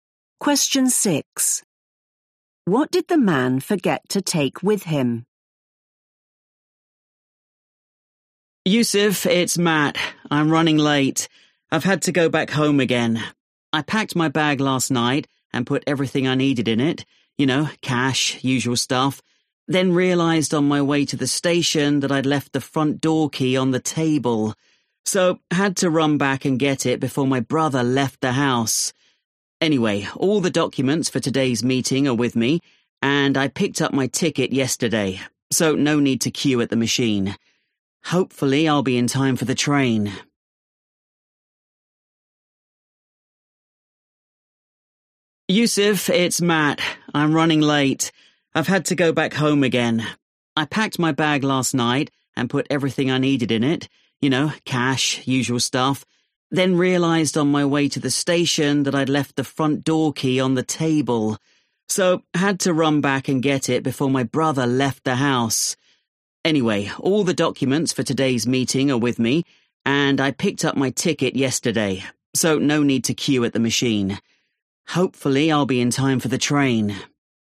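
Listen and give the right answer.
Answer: the front door key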